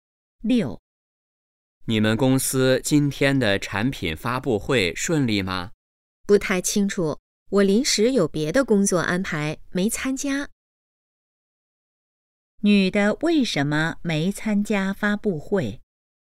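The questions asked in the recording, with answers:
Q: 女的为什么没参加发布会?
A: 临时有别的工作安排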